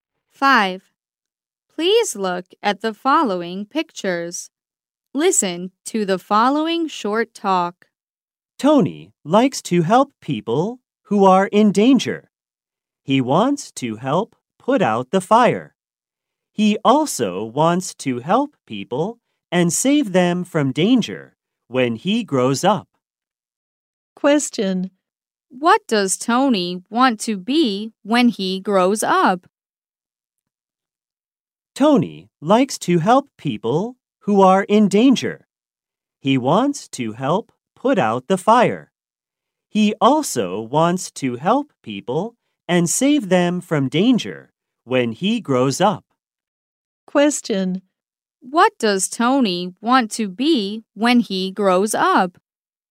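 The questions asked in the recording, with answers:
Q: What does Tony want to be when he grows up?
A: A firefighter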